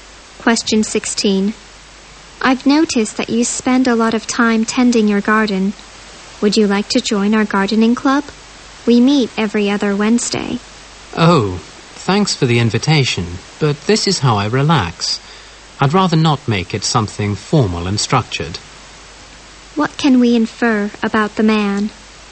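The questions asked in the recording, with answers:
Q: What can we infer about the man?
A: He gardens to relax and doesn't want to join a formal club.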